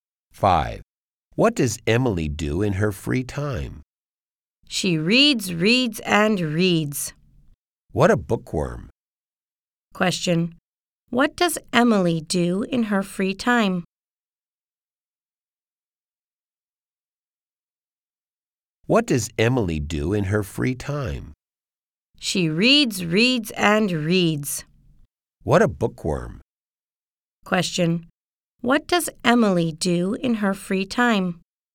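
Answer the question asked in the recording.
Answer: She reads.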